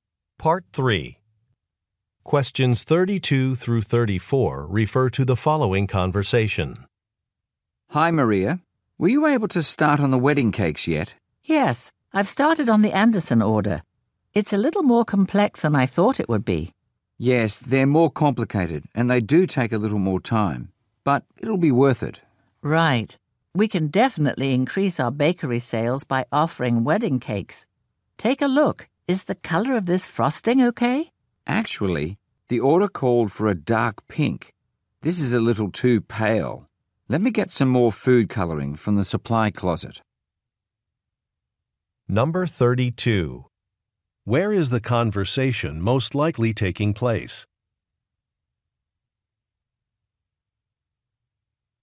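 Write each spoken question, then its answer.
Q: Where is the conversation most likely taking place?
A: At a bakery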